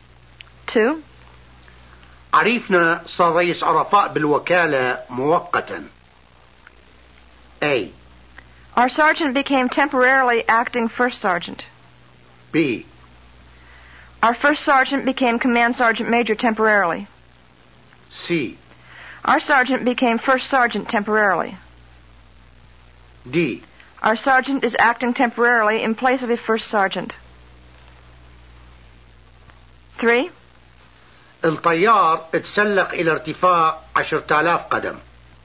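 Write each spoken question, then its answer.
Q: عرفنا صار رئيس عرفاء بالوكالة مؤقتا.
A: A: Our sergeant became temporarily acting first sergeant.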